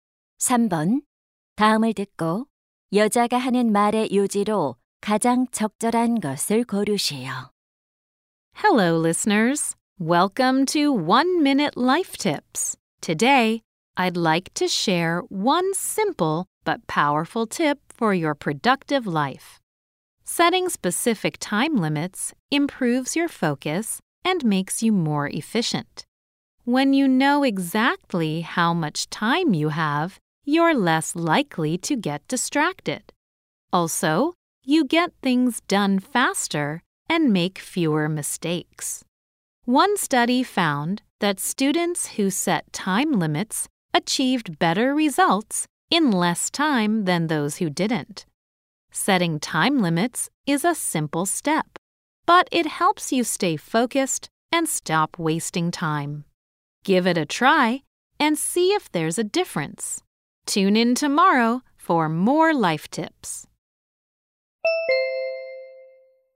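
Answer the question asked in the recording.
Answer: 구체적인 시간 제한을 정하면 집중력과 효율이 높아진다.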